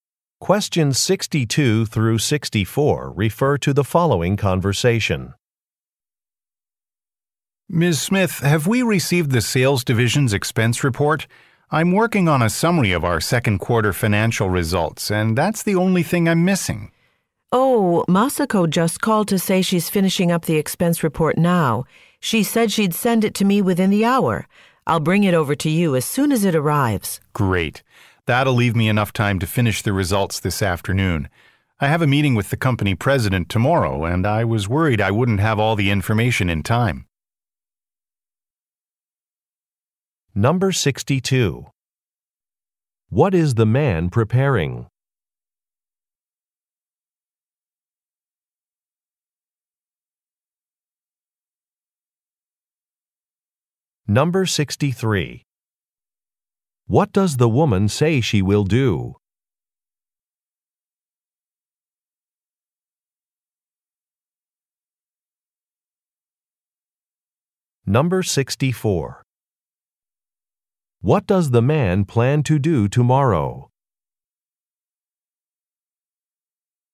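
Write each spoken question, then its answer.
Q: What is the man preparing?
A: A summary of second-quarter financial results

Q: What does the woman say she will do?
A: Bring him the expense report when it arrives

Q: What does the man plan to do tomorrow?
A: Meet with the company president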